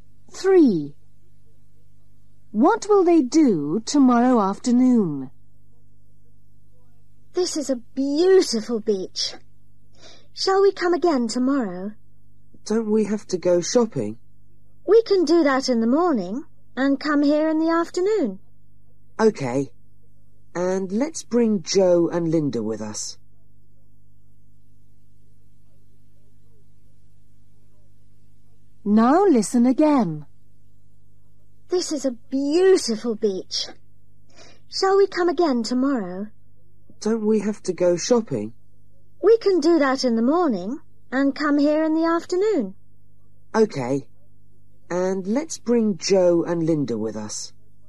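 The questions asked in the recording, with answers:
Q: What will they do tomorrow afternoon?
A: go to the beach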